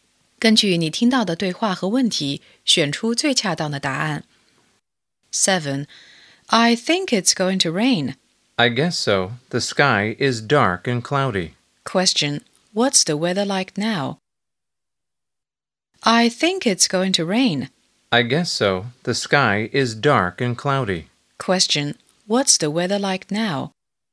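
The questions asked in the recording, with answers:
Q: What's the weather like now?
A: It's dark and cloudy.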